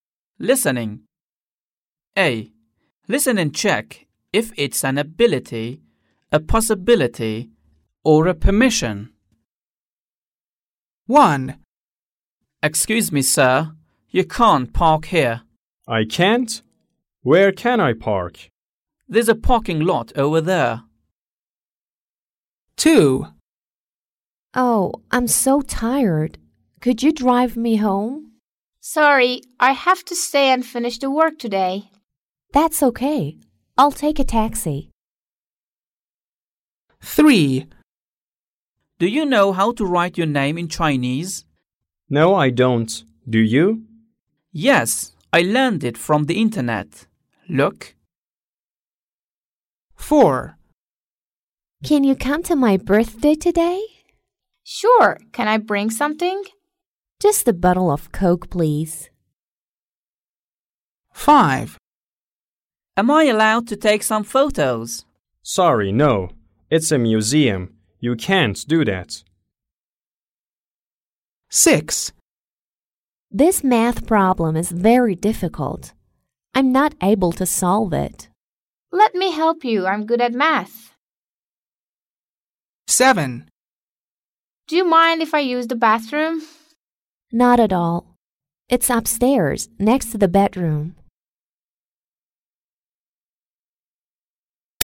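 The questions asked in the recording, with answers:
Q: Listen and check if it's an ability, a possibility, or a permission.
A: permission

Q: Listen and check if it's an ability, a possibility, or a permission.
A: ability

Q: Listen and check if it's an ability, a possibility, or a permission.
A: permission

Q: Listen and check if it's an ability, a possibility, or a permission.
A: ability

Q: Listen and check if it's an ability, a possibility, or a permission.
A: permission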